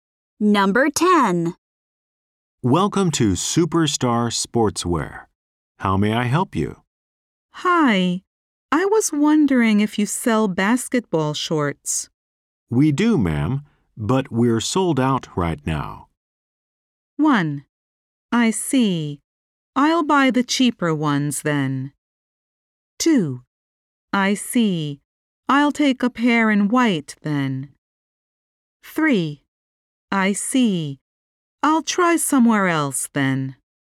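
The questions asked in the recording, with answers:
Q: We do, ma'am, but we're sold out right now.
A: 3: I see. I'll try somewhere else then.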